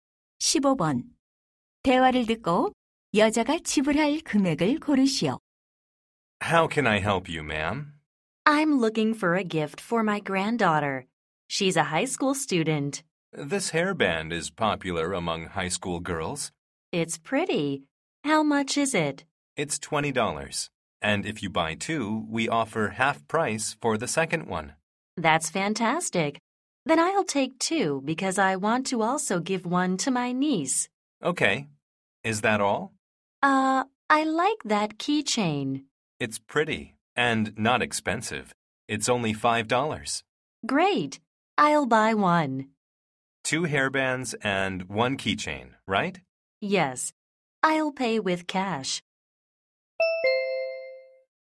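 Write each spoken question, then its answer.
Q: 대화를 듣고 여자가 지불할 금액을 고르시오.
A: $35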